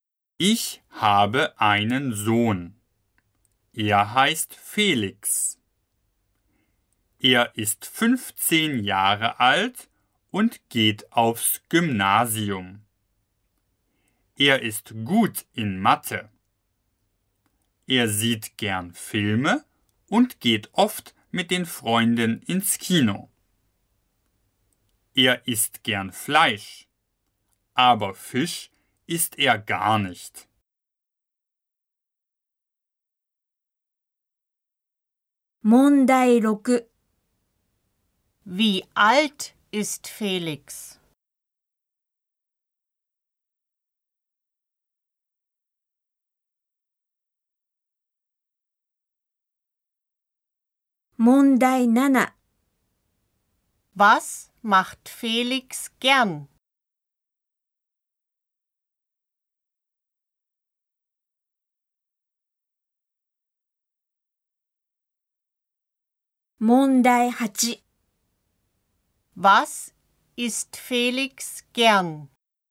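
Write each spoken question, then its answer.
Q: Wie alt ist Felix?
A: 15 Jahre alt

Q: Was macht Felix gern?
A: Filme sehen / ins Kino gehen

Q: Was ist Felix gern?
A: Fleisch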